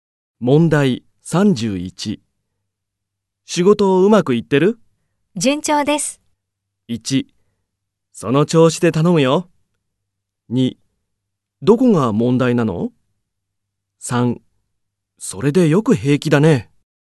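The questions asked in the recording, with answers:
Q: 仕事をうまくいってる?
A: 1: その調子で頼むよ。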